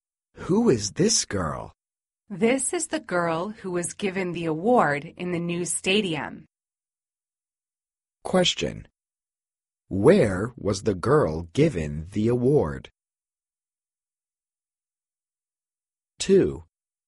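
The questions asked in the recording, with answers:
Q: Where was the girl given the award?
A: In the new stadium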